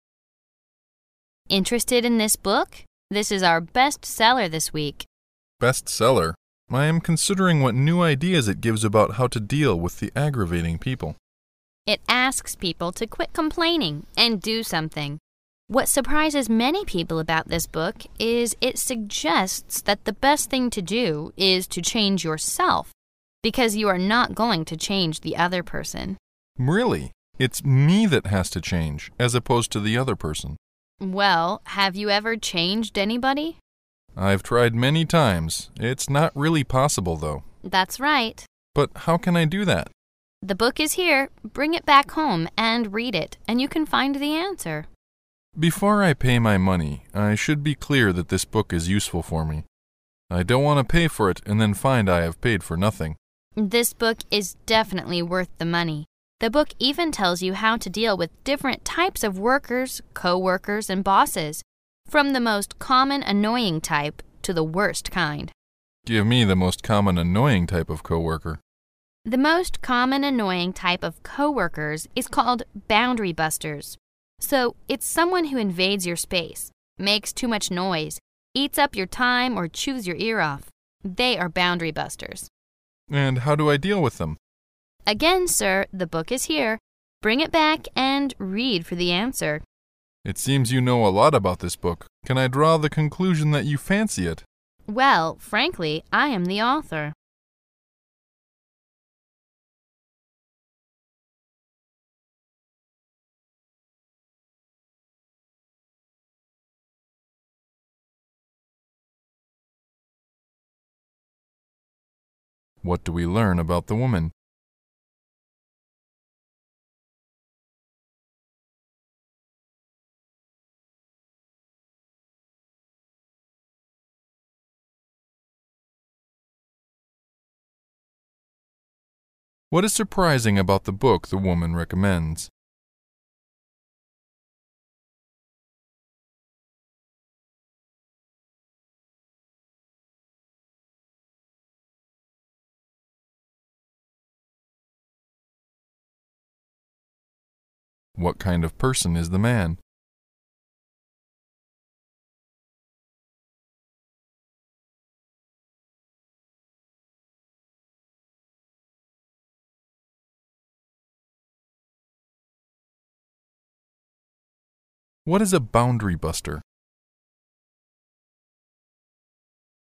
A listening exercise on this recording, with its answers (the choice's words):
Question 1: What is surprising about the book the woman recommends?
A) It has been the bestseller for weeks.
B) It advises people to change themselves.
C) It is being sold at a very low price.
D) It distinguishes co-operators.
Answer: It advises people to change themselves.

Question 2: What kind of person is the man?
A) A man careful with money.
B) A book-lover.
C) A noisy reader.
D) A trouble-maker.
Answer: A man careful with money.

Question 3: What is a boundary buster?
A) Someone who always talks about himself.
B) The most violent type of coworkers.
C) Someone who stabs your back.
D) The most common annoying type of people.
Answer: The most common annoying type of people.

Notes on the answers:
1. 根据听前预测可知,选项中的it 指的是书。由对话中提到的What surprises many people about this book is it suggests that the best thing to do is to change yourself...可知,这本书最令人惊奇的是它建议人们最好是改变自己,而不是试图改变别人,故[B]为答案。
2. 本题考查人物性格或爱好等。对话中提到的Before I pay my money... find I have paid for nothing可推测。男士是个花钱很谨慎的人,故[A]为答案。
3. 对话中提到的The most common annoying type of coworkers is called "boundary busters" 表明[D]为答案。

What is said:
[解析] 19-22 W: Interested in this book? This is our best seller this week. M: Best seller? I am considering what new ideas it gives about how to deal with the aggravating people. W: It asks people to quit complaining and do something. What surprises many people about this book is it suggests that the best thing to do is to change yourself because you am not going to change the other person. M: Really? It's "me" that has to change as opposed to the other person? W: Well, have you ever changed anybody? M: I've tried many times. It's not really possible though. W: That's right. M: But how can I do that? W: The book is here. Bring it back home and read it and you can find the answer. M: Before I pay my money I should be clear that this book is useful for me. I don't want to pay for it and then find I have paid for nothing. W: This book is definitely worth the money. The book even tells you how to deal with different types of workers, coworkers and bosses, from the most common annoying type to the worst kind. M: Give me the most common annoying type of coworker. W: The most common annoying type of coworkers is called "boundary busters". So, it's someone who invades your space, makes too much noise, eats up your time or chews your ear off. They are boundary busters. M: And how do I deal with them? Bring it back and read for the answer. M: It seems you know a lot about this book. Can I draw the conclusion that you fancy it? W: Well, frankly, I am the author. 19.What do we learn about the woman?